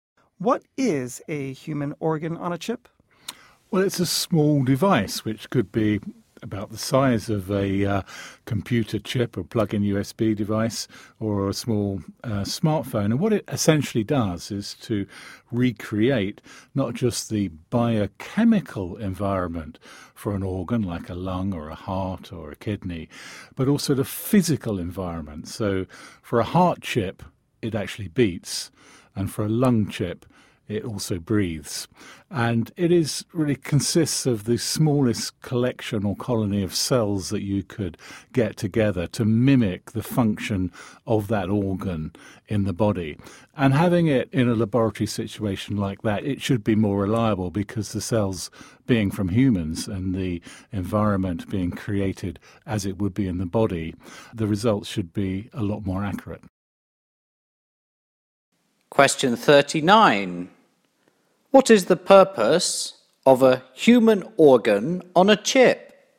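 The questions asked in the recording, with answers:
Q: What is the purpose of a human organ on a chip?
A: To mimic how an organ works in the body, so lab results are more reliable and accurate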